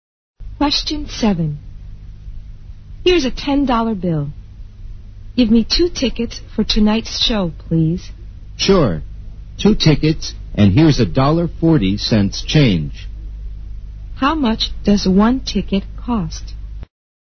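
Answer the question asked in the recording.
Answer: $4.30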